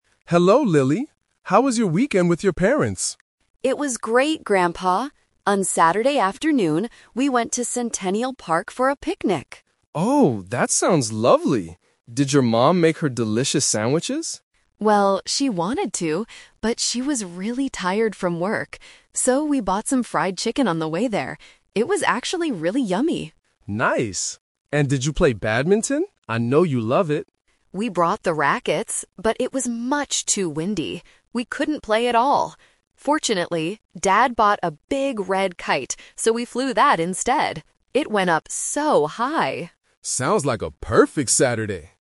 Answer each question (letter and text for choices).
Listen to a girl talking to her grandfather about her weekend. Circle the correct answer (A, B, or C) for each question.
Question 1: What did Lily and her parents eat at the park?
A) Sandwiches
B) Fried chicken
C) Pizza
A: B) Fried chicken

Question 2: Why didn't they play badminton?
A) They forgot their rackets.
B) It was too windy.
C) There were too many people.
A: B) It was too windy.

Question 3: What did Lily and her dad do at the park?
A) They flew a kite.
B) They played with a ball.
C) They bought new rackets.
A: A) They flew a kite.

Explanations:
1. Lily says her mom wanted to make sandwiches (Option A is a trap), but she was tired. Therefore, they bought fried chicken instead. Pizza (Option C) is not mentioned.
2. Lily says they brought the rackets, so they didn't forget them (Option A is a trap). However, they couldn't play because it was "much too windy." Option C is not mentioned in the audio.
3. Lily mentions that her dad bought a big red kite, and they "flew that instead." They didn't play with a ball (Option B), and they brought their old rackets, they didn't buy new ones (Option C is a trap).

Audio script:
Grandpa: Hello, Lily! How was your weekend with your parents?
Lily: It was great, Grandpa! On Saturday afternoon, we went to Centennial Park for a picnic.
Grandpa: Oh, that sounds lovely. Did your mom make her delicious sandwiches?
Lily: Well, she wanted to, but she was really tired from work. So, we bought some fried chicken on the way there. It was actually really yummy!
Grandpa: Nice! And did you play badminton? I know you love it.
Lily: We brought the rackets, but it was much too windy. We couldn't play at all. Fortunately, Dad bought a big red kite, so we flew that instead. It went up so high!
Grandpa: Sounds like a perfect Saturday.